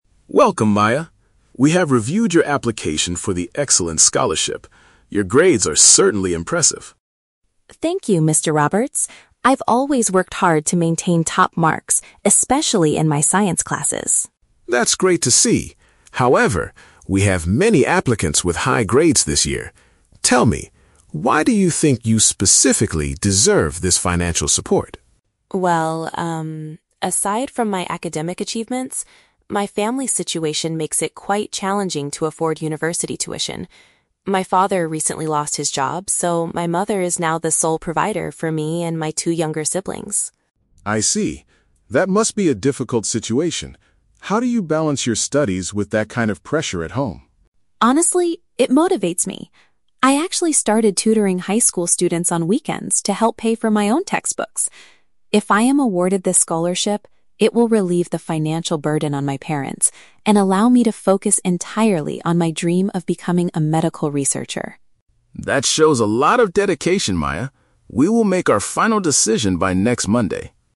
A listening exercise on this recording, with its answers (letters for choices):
Listen to the interview between a school board member and a student, and choose the correct answer (A, B, or C) for each question.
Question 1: Why does Maya need financial assistance for her university studies?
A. Her father spends a lot of money on his medical treatments.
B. Her mother is currently the only person earning an income.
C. Her parents are saving all their money for her younger siblings.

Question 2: How does Maya currently manage to buy her study materials?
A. She works part-time as an assistant in a medical lab.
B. She borrows textbooks from her high school teachers.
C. She earns money by teaching younger students in her free time.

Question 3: What is Maya's ultimate career goal?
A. To work in the healthcare field doing scientific studies.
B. To become a science teacher at a local high school.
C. To manage a charity fund for students with financial burdens.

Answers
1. B
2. C
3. A

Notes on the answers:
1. Maya says her father lost his job and her mother is the "sole provider". Option B paraphrases "sole provider" as "the only person earning an income". The Trap: Option (A) is a trap. The audio mentions "medical" later (medical researcher), and "father", but he is not sick; he lost his job. Option (C) mentions "younger siblings", which are in the audio, but the parents are not saving money for them; they are just struggling to support everyone.
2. Maya explains that she started "tutoring high school students on weekends" to pay for her textbooks. Option C paraphrases this as "teaching younger students in her free time". The Trap: Option (A) is a trap. "Medical lab" connects to her future dream of being a "medical researcher", not her current part-time job. Option (B) is a logical guess but is not mentioned at all.
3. Maya states her dream is "becoming a medical researcher". Option A paraphrases "medical researcher" as working in the "healthcare field doing scientific studies". The Trap: Option (B) is a trap because she currently "tutors" (teaches), but that is just to earn money now, not her ultimate career goal. Option (C) uses the words "financial burden" from the audio, but it applies to her own family, not a charity she wants to run.

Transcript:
Mr. Roberts: Welcome, Maya. We have reviewed your application for the Excellence Scholarship. Your grades are certainly impressive.
Maya: Thank you, Mr. Roberts. I've always worked hard to maintain top marks, especially in my Science classes.
Mr. Roberts: That's great to see. However, we have many applicants with high grades this year. Tell me, why do you think you specifically deserve this financial support?
Maya: Well, um, aside from my academic achievements, my family's situation makes it quite challenging to afford university tuition. My father recently lost his job, so my mother is now the sole provider for me and my two younger siblings.
Mr. Roberts: I see. That must be a difficult situation. How do you balance your studies with that kind of pressure at home?
Maya: Honestly, it motivates me. I actually started tutoring high school students on weekends to help pay for my own textbooks. If I am awarded this scholarship, it will relieve the financial burden on my parents, and allow me to focus entirely on my dream of becoming a medical researcher.
Mr. Roberts: That shows a lot of dedication, Maya. We will make our final decision by next Monday.